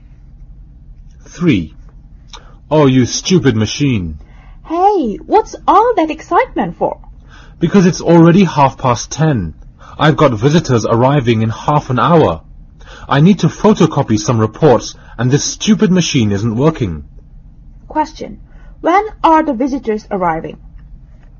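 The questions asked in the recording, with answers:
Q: When are the visitors arriving?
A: 11:00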